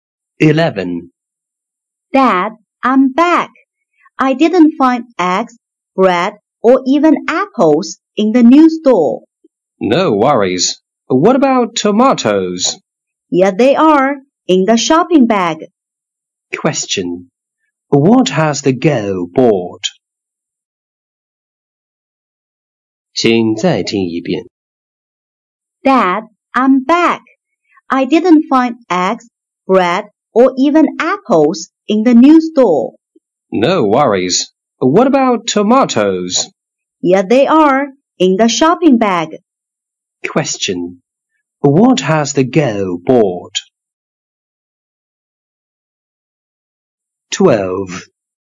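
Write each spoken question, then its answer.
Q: What has the girl bought?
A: Tomatoes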